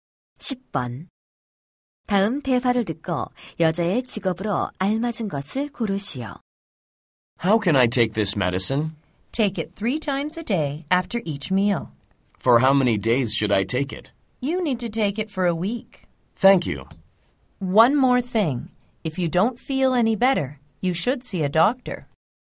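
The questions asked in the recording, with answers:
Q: 다음 대화를 듣고 여자의 직업으로 알맞은 것을 고르시오.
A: 약사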